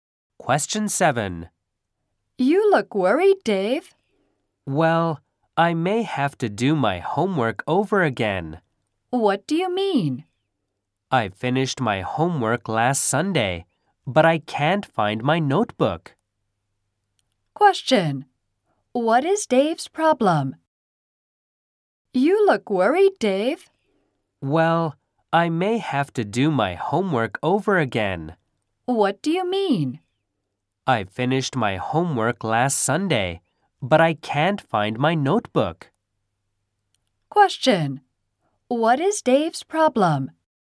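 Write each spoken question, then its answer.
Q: What is Dave's problem?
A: He can't find his notebook.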